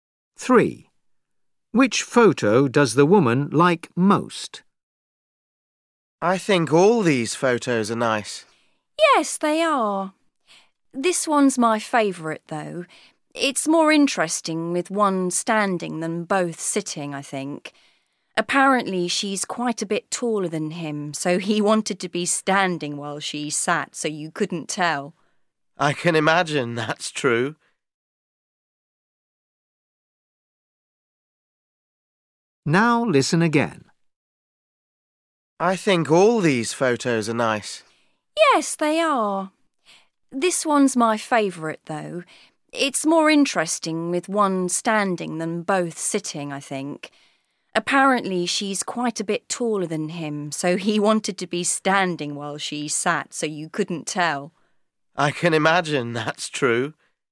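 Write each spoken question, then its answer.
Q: Which photo does the woman like most?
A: the one with him standing and her sitting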